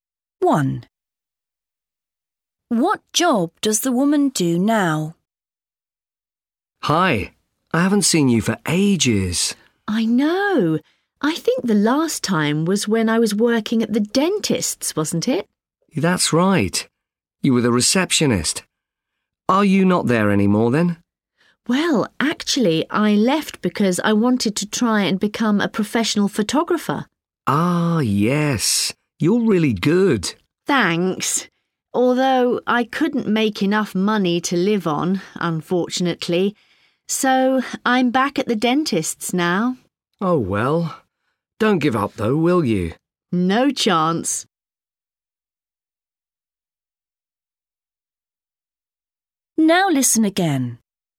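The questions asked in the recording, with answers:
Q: What job does the woman do now?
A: dentist's receptionist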